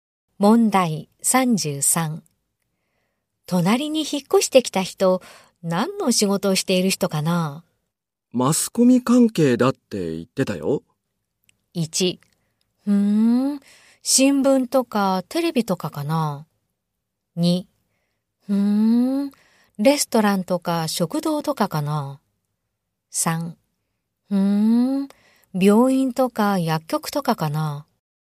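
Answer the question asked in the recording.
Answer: 1: 新聞とかテレビとかかな?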